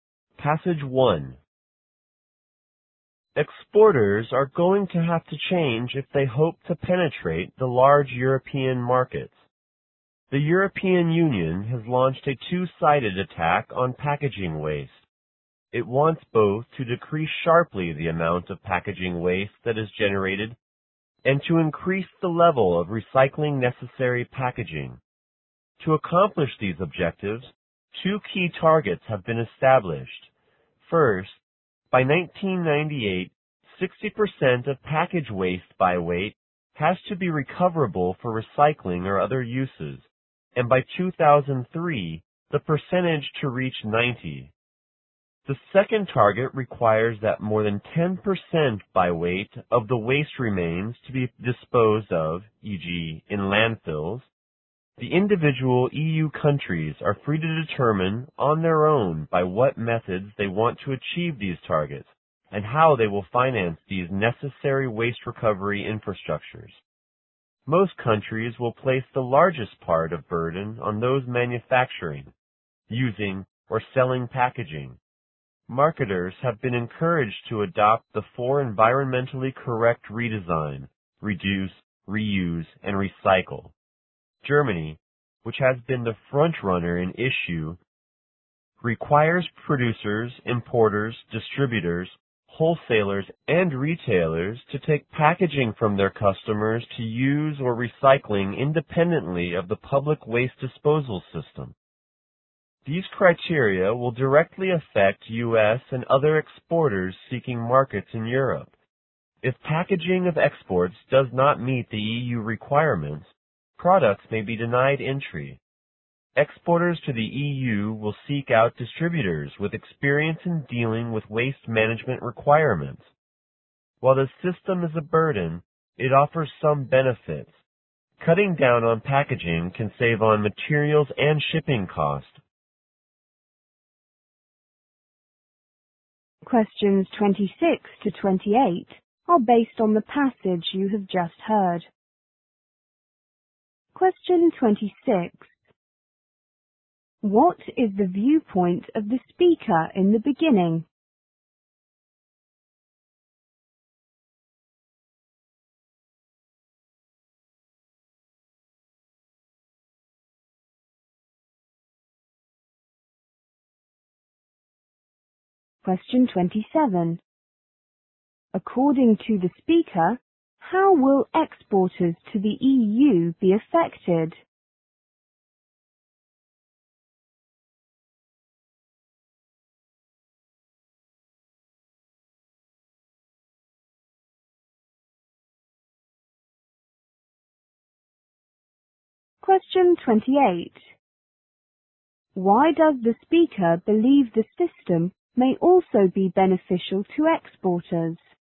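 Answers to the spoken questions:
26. Exporters must change to get into European markets.
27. Their products may be denied entry if packaging doesn't meet EU requirements.
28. Less packaging saves on materials and shipping costs.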